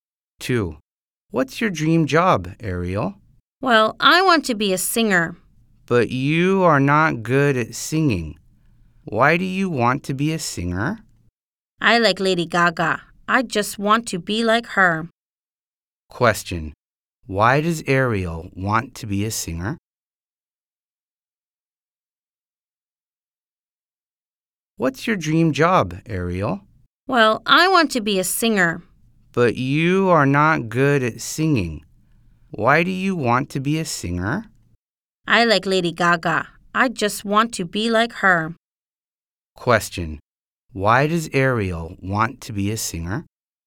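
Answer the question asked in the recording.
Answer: She likes Lady Gaga and wants to be like her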